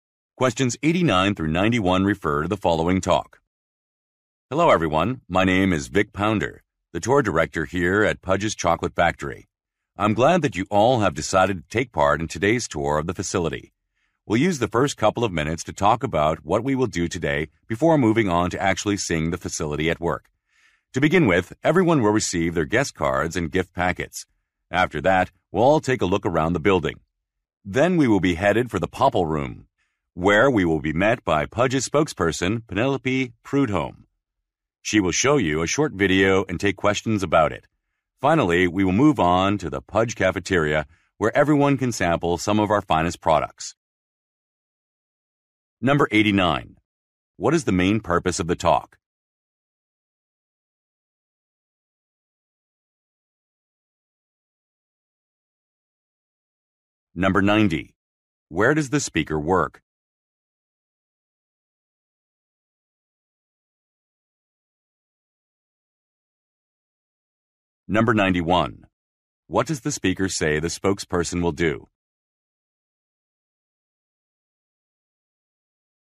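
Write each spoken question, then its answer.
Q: What is the main purpose of the talk?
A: To explain the schedule for the factory tour

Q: Where does the speaker work?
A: At a chocolate factory

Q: What does the speaker say the spokesperson will do?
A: Show a short video and take questions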